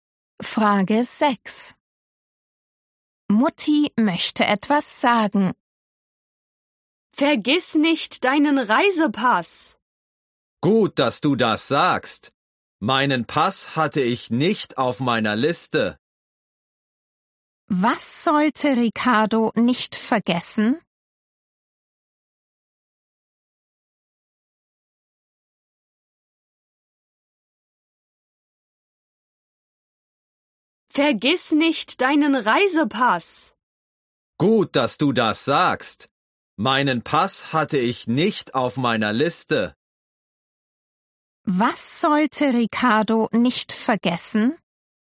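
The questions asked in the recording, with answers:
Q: Was sollte Ricardo nicht vergessen?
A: seinen Reisepass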